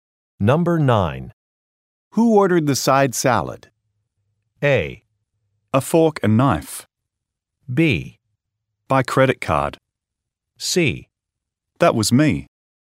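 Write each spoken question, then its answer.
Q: Who ordered the side salad?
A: C: That was me.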